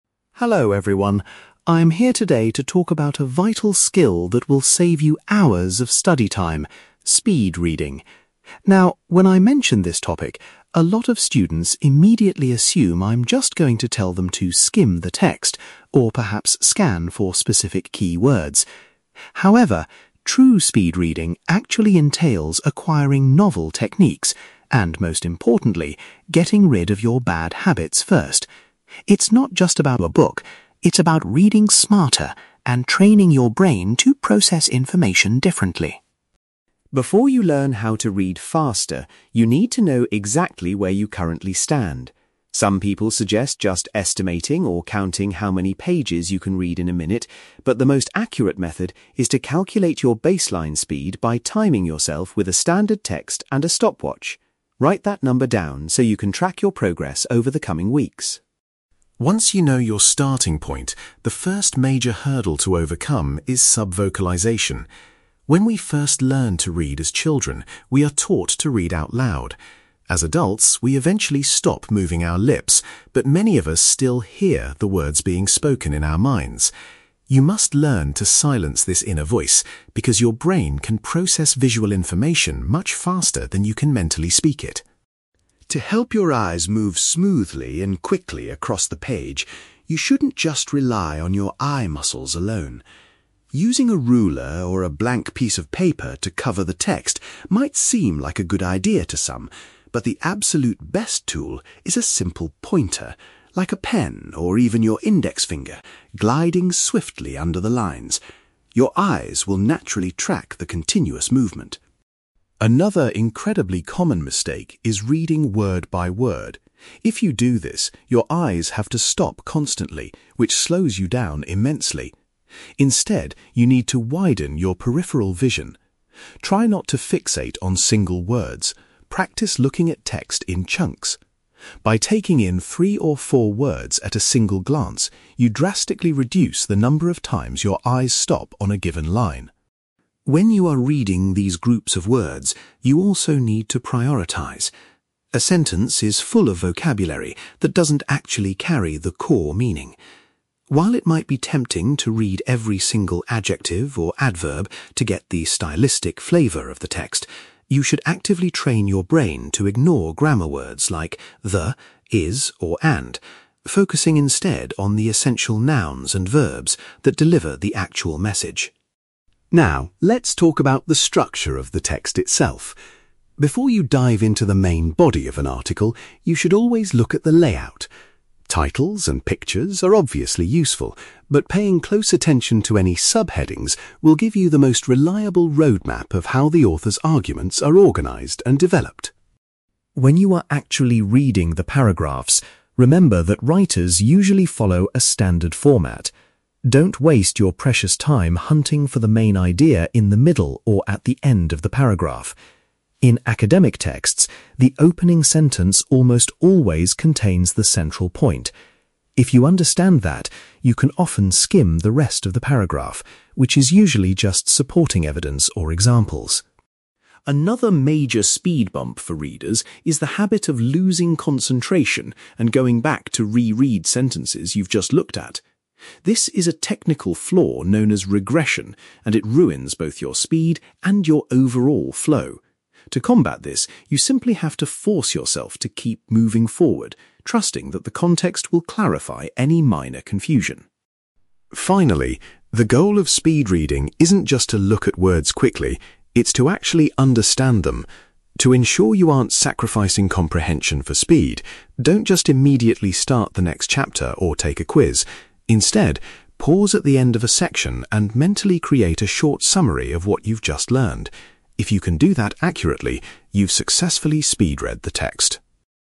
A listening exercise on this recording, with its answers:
You will hear an educator giving a talk to students about speed reading techniques. For questions 9-18, complete the sentences with a word or short phrase.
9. Students are told that before learning new reading techniques, they must eliminate their (9)........................... .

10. The first practical step is to find out your (10)........................... using a stopwatch.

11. To increase reading pace, it is essential to stop the (11)........................... that people often hear in their heads.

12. The speaker recommends utilizing a (12)........................... to guide the eyes smoothly across the page.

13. Rather than focusing on individual words, readers should view the text in (13)........................... .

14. To extract the main meaning efficiently, readers should skip over (14)........................... .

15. Checking the (15)........................... provides a helpful guide to the organization of the text.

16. In academic writing, the core idea is usually found in the (16)........................... of a paragraph.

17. The habit of continually re-reading previous sentences is referred to as (17)........................... .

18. To check comprehension, students should form a (18)........................... in their minds after finishing a section.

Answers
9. bad habits
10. baseline speed
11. inner voice
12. pointer
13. chunks
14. grammar words
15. subheadings
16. opening sentence
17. regression
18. short summary

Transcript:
Teacher: Hello everyone. I'm here today to talk about a vital skill that will save you hours of study time: speed reading. Now, when I mention this topic, a lot of students immediately assume I'm just going to tell them to skim the text or perhaps scan for specific keywords. However, true speed reading actually entails acquiring novel techniques and, most importantly, getting rid of your bad habits first. It's not just about rushing through a book; it's about reading smarter and training your brain to process information differently.
Before you learn how to read faster, you need to know exactly where you currently stand. Some people suggest just estimating or counting how many pages you can read in a minute, but the most accurate method is to calculate your baseline speed by timing yourself with a standard text and a stopwatch. Write that number down so you can track your progress over the coming weeks.
Once you know your starting point, the first major hurdle to overcome is subvocalization. When we first learn to read as children, we are taught to read out loud. As adults, we eventually stop moving our lips, but many of us still "hear" the words being spoken in our minds. You must learn to silence this inner voice because your brain can process visual information much faster than you can mentally speak it.
To help your eyes move smoothly and quickly across the page, you shouldn't just rely on your eye muscles alone. Using a ruler or a blank piece of paper to cover the text might seem like a good idea to some, but the absolute best tool is a simple pointer, like a pen or even your index finger, gliding swiftly under the lines. Your eyes will naturally track the continuous movement.
Another incredibly common mistake is reading word by word. If you do this, your eyes have to stop constantly, which slows you down immensely. Instead, you need to widen your peripheral vision. Try not to fixate on single words; practice looking at text in chunks. By taking in three or four words at a single glance, you drastically reduce the number of times your eyes stop on a given line.
When you are reading these groups of words, you also need to prioritize. A sentence is full of vocabulary that doesn't actually carry the core meaning. While it might be tempting to read every single adjective or adverb to get the stylistic flavor of the text, you should actively train your brain to ignore grammar words like 'the', 'is', or 'and', focusing instead on the essential nouns and verbs that deliver the actual message.
Now, let's talk about the structure of the text itself. Before you dive into the main body of an article, you should always look at the layout. Titles and pictures are obviously useful, but paying close attention to any subheadings will give you the most reliable roadmap of how the author's arguments are organized and developed.
When you are actually reading the paragraphs, remember that writers usually follow a standard format. Don't waste your precious time hunting for the main idea in the middle or at the end of the paragraph. In academic texts, the opening sentence almost always contains the central point. If you understand that, you can often skim the rest of the paragraph, which is usually just supporting evidence or examples.
Another major speed-bump for readers is the habit of losing concentration and going back to re-read sentences you've just looked at. This is a technical flaw known as regression, and it ruins both your speed and your overall flow. To combat this, you simply have to force yourself to keep moving forward, trusting that the context will clarify any minor confusion.
Finally, the goal of speed reading isn't just to look at words quickly; it's to actually understand them. To ensure you aren't sacrificing comprehension for speed, don't just immediately start the next chapter or take a quiz. Instead, pause at the end of a section and mentally create a short summary of what you've just learned. If you can do that accurately, you've successfully speed read the text.

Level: B2